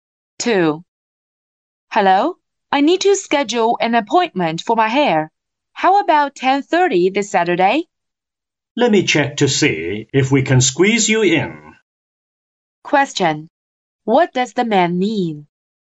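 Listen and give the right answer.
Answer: He isn't sure there is time at 10:30; he needs to check whether he can fit her in.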